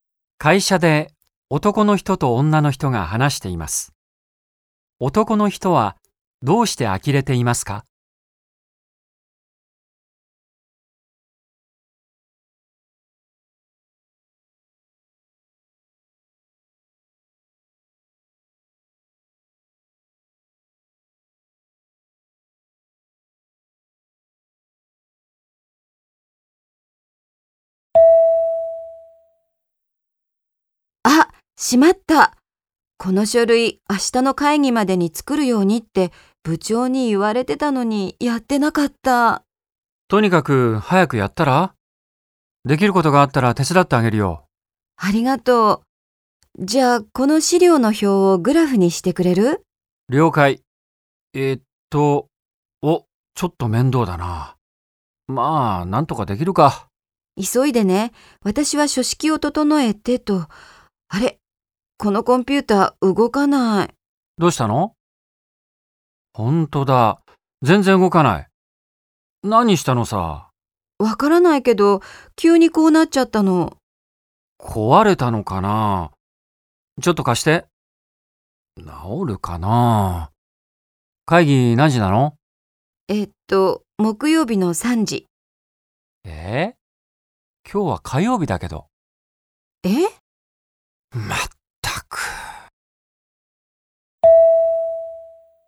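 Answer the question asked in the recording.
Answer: 女の人が会議の日を間違えていたから(会議は木曜日で、今日は火曜日なので明日ではない)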